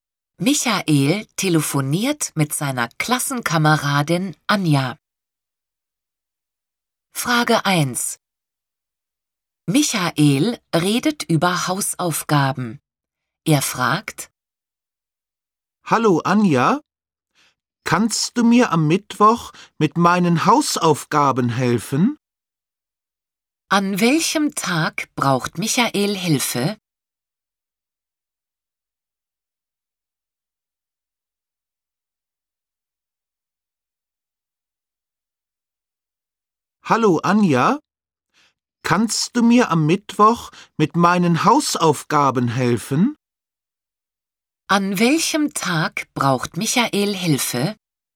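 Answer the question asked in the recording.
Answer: Am Mittwoch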